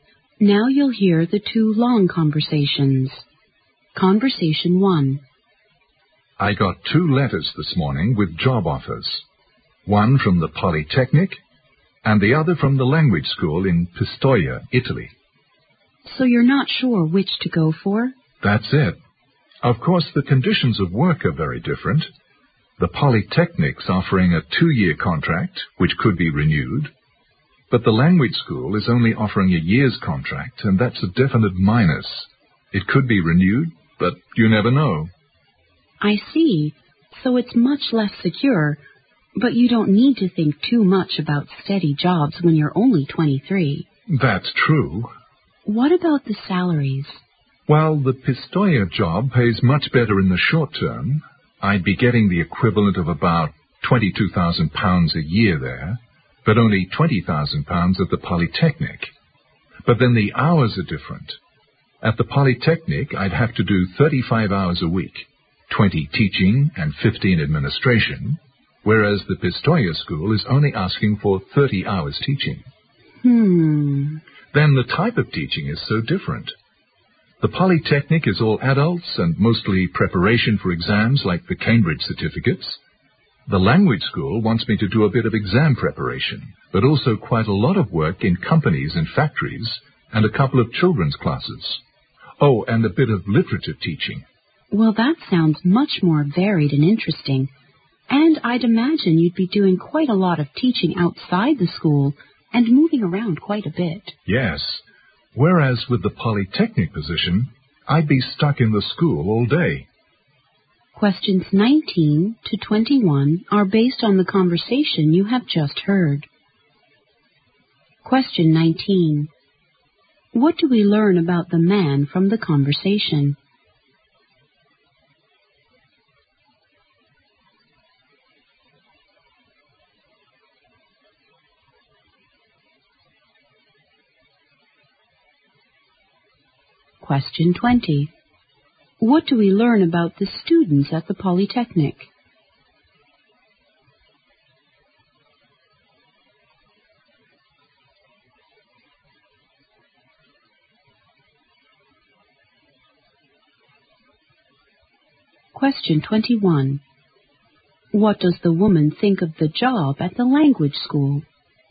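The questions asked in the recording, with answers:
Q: What do we learn about the students at the Polytechnic?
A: They are all adults, mostly preparing for exams like the Cambridge certificates.

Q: What does the woman think of the job at the language school?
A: It is more varied and interesting.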